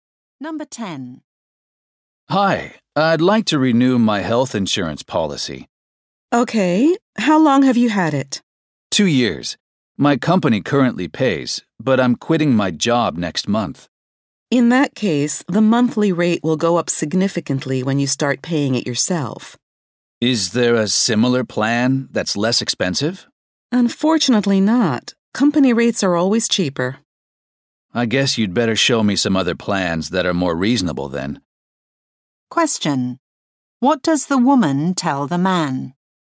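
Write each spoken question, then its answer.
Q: What does the woman tell the man?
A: His monthly rate will go up a lot when he pays it himself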